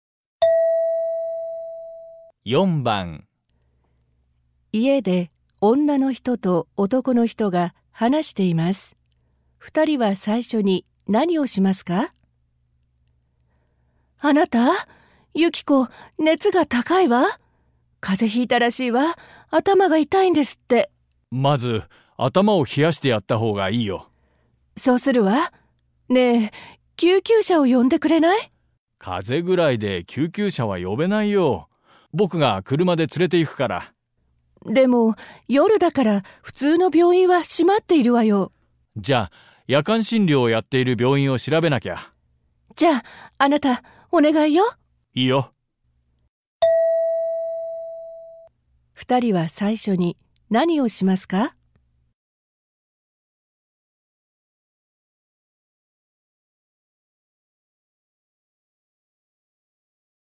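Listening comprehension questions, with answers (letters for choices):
問題1では、まず質問を聞いてください。それから話を聞いて、問題用紙の1から4の中から、最もよいものを一つ選んでください。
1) 二人は最初に何をしますか。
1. 子供の頭を冷やす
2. 救急車を呼ぶ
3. 子供を病院に連れて行く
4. 車を出す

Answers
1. 1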